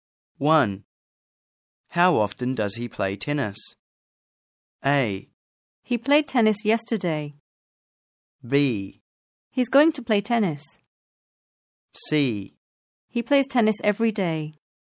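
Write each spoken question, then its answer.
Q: How often does he play tennis?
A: C: He plays tennis every day.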